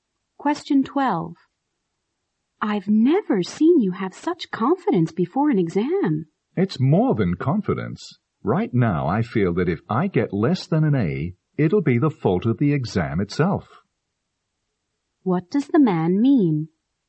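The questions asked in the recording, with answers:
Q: What does the man mean?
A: He is extremely confident he will get an A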